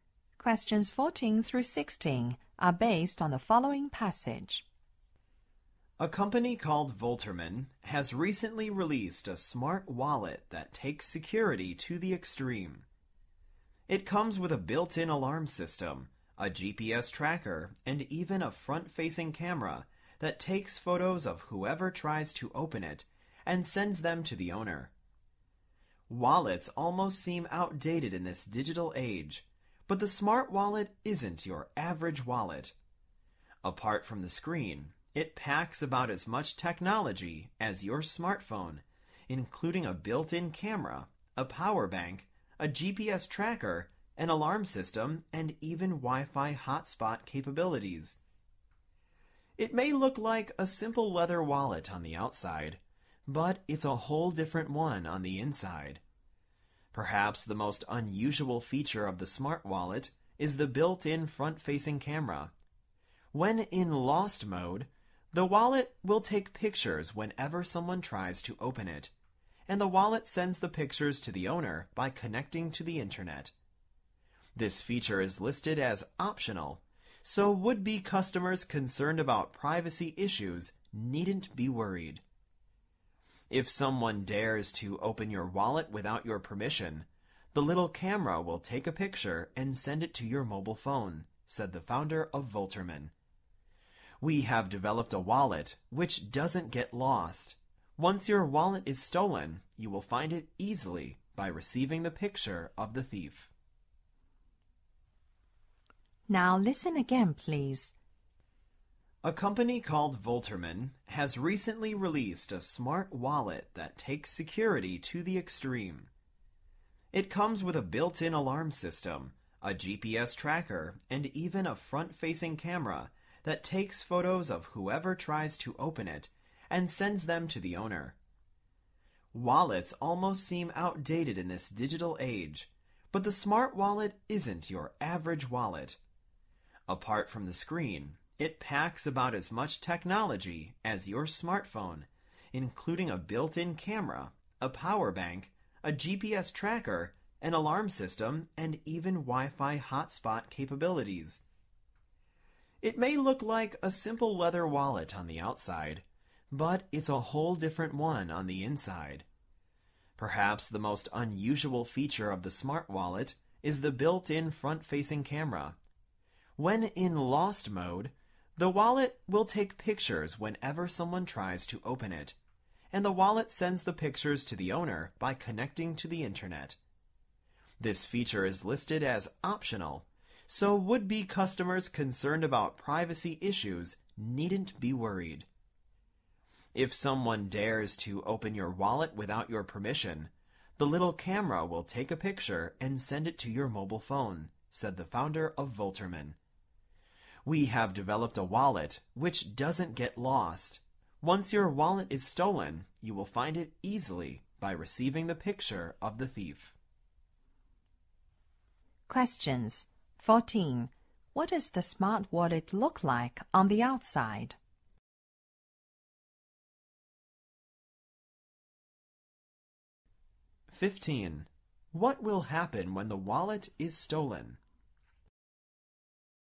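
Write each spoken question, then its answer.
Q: What does the smart wallet look like on the outside?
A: A simple leather wallet

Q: What will happen when the wallet is stolen?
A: Its camera takes a picture of the thief and sends it to the owner's phone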